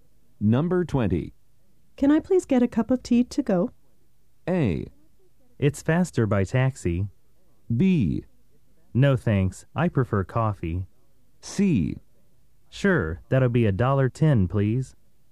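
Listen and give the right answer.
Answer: C: Sure, that'll be $1.10, please.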